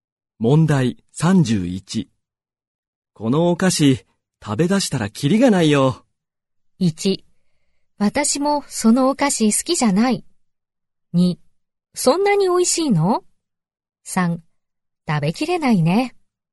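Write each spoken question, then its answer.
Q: このお菓子、食べ出したらキリがないよ。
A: 2: そんなに美味しいの?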